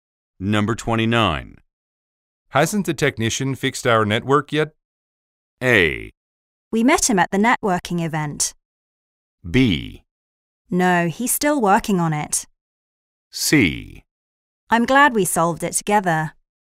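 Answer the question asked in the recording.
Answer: B: No, he's still working on it.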